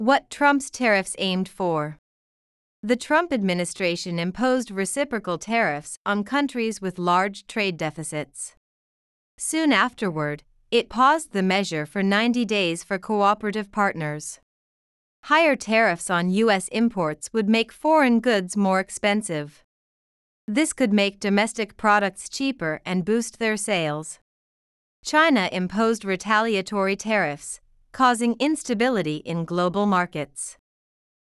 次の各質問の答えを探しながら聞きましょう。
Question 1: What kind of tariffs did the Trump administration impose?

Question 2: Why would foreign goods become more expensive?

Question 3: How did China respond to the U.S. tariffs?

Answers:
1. It imposed reciprocal tariffs on countries with large trade deficits.
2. Because higher tariffs would raise their prices in the U.S.
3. China imposed retaliatory tariffs, causing global market instability.

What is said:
What Trump's Tariffs Aimed For
The Trump administration imposed "reciprocal tariffs" on countries with large trade deficits.
Soon afterward, it paused the measure for 90 days for cooperative partners.
Higher tariffs on U.S. imports would make foreign goods more expensive.
This could make domestic products cheaper and boost their sales.
China imposed retaliatory tariffs, causing instability in global markets.

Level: 中級